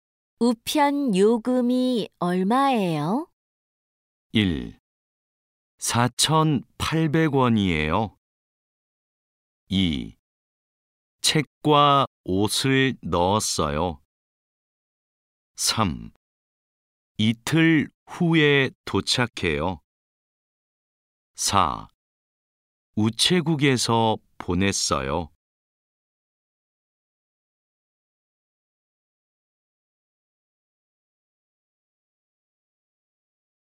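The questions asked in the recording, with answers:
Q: 우편 요금이 얼마예요?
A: 1: 4,800원이에요.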